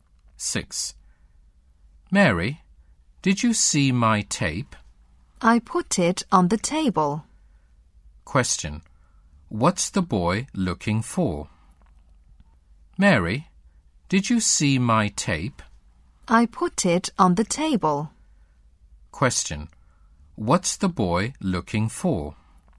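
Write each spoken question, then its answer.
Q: What's the boy looking for?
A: His tape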